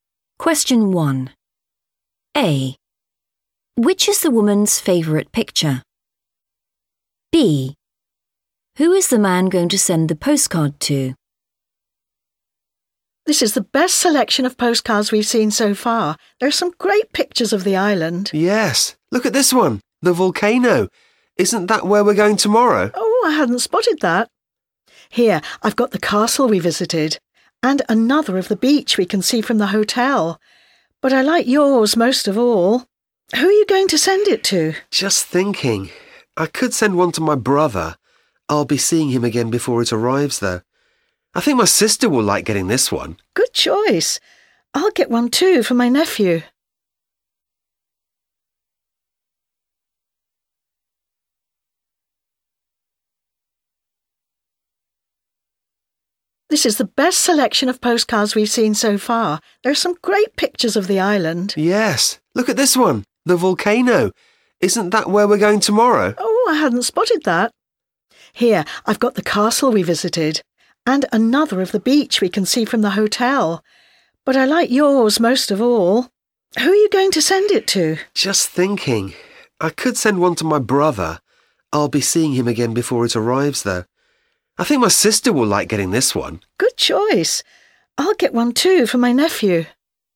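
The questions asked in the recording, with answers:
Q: Which is the woman's favourite picture?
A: the volcano

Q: Who is the man going to send the postcard to?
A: his sister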